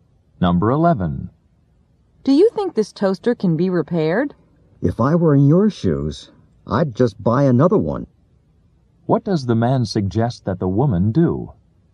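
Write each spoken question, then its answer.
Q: What does the man suggest that the woman do?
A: Buy a new toaster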